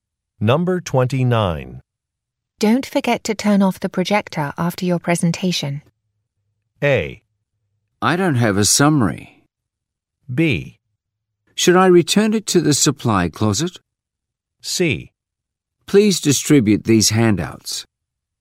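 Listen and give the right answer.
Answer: B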